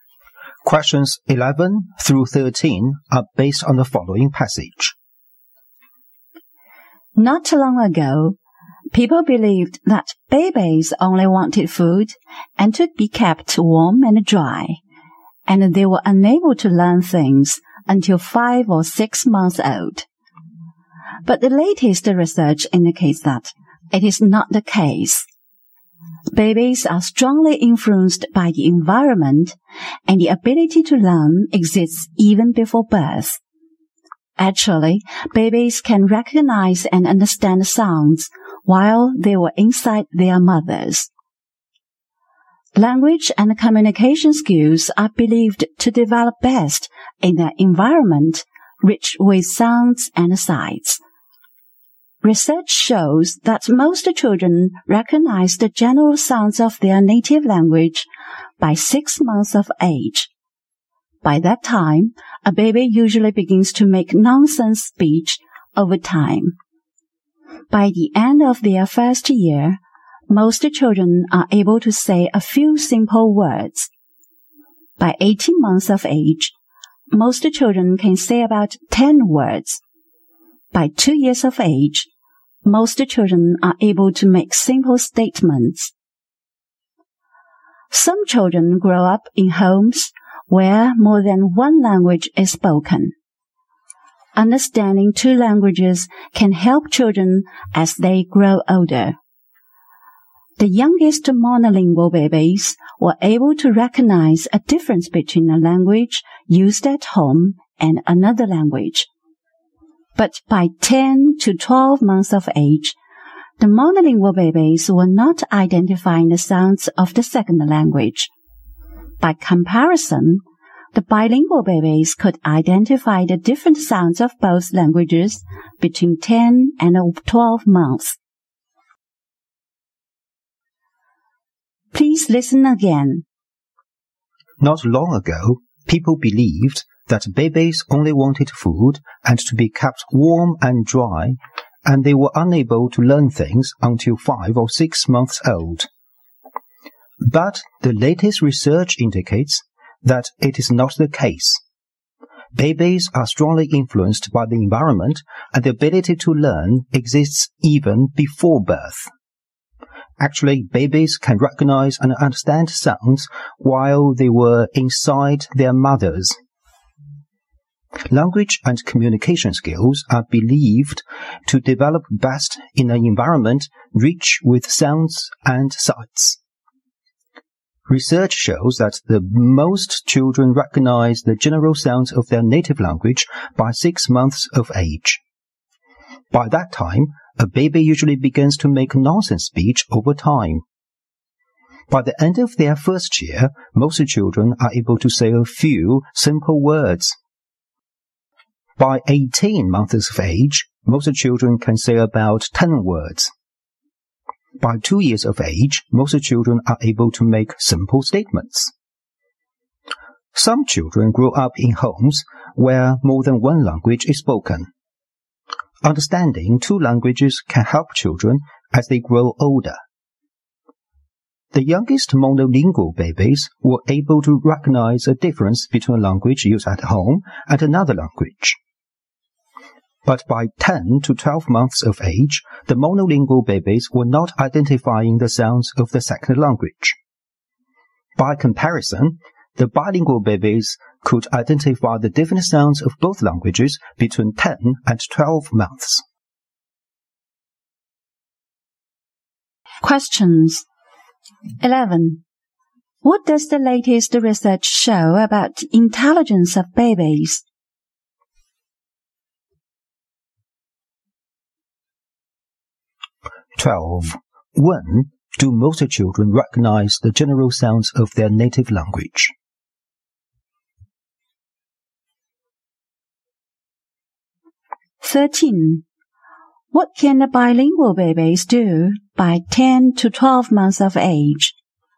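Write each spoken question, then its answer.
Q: What does the latest research show about intelligence of babies?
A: Babies can learn even before birth.

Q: When do most children recognize the general sounds of their native language?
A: By 6 months of age.

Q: What can a bilingual baby do by 10 to 12 months of age?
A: Identify the different sounds of both languages.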